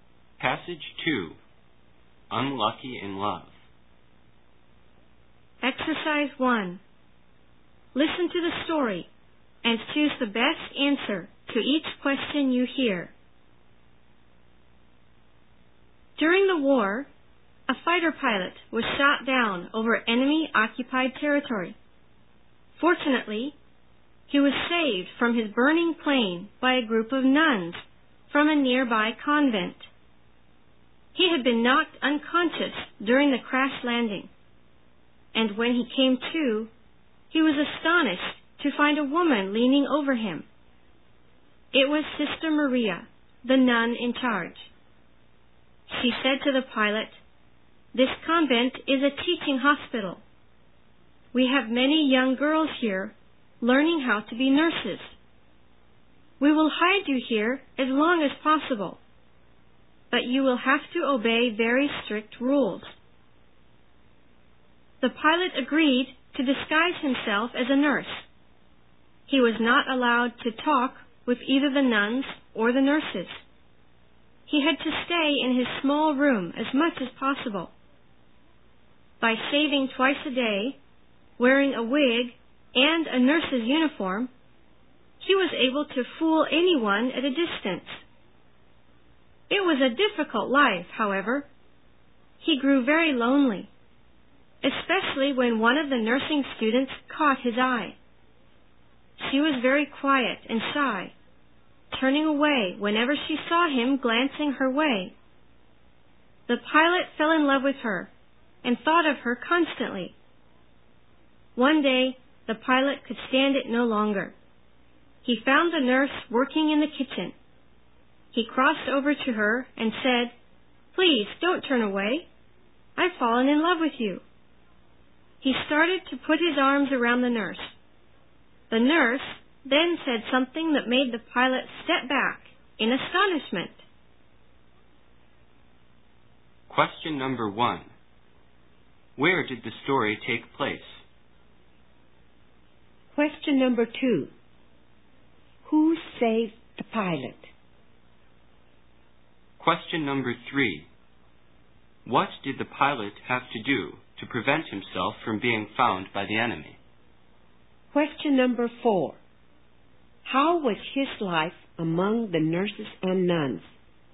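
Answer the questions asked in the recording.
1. In a convent that was a teaching hospital, in enemy-occupied territory
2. A group of nuns
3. Disguise himself as a nurse
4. Difficult and lonely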